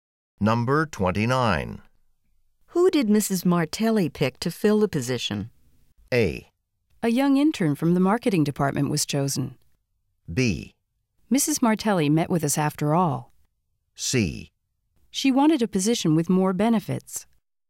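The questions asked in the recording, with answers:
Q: Who did Mrs. Martelli pick to fill the position?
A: A: A young intern from the marketing department was chosen.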